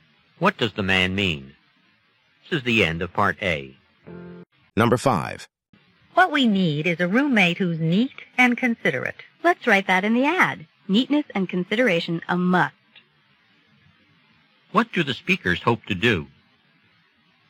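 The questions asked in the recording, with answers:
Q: What do the speakers hope to do?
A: Find a neat, considerate roommate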